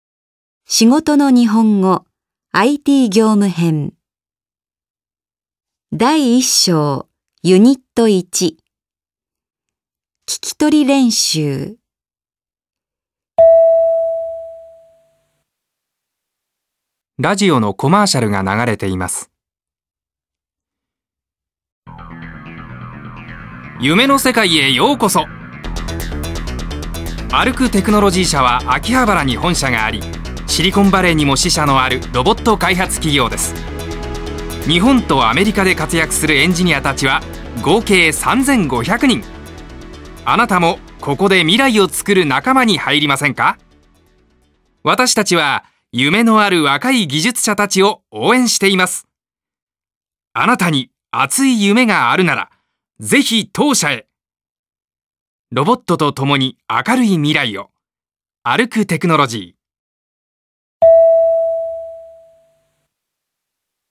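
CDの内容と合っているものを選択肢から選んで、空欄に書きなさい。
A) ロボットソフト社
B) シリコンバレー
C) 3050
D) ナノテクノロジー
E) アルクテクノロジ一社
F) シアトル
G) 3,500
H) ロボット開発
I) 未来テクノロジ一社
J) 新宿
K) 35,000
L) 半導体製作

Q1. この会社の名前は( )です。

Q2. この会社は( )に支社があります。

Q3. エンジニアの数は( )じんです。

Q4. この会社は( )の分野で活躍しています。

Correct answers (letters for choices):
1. E
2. B
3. G
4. H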